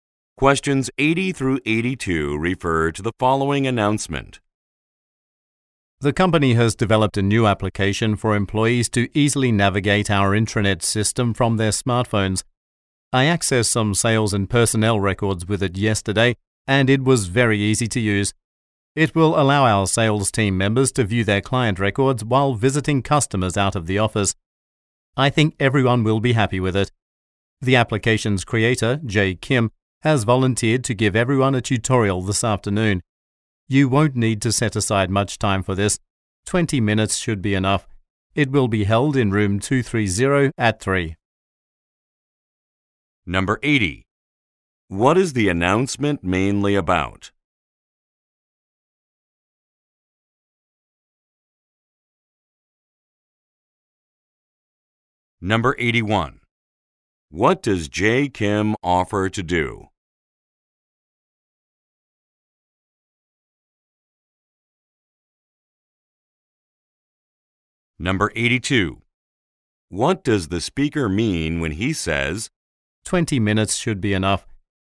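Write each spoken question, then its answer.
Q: What is the announcement mainly about?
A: A new smartphone application for the intranet

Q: What does Jay Kim offer to do?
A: Give everyone a tutorial

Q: What does the speaker mean when he says, 20 minutes should be enough?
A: The tutorial will not take much time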